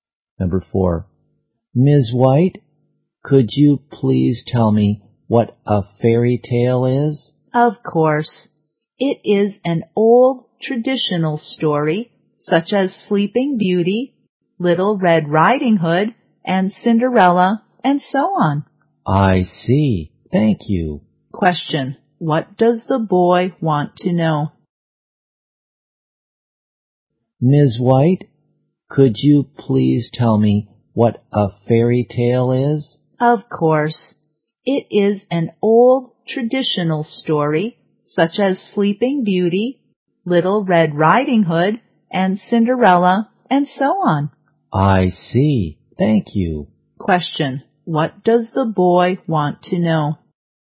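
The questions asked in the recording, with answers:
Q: what does the boy want to know?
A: What a fairy tale is.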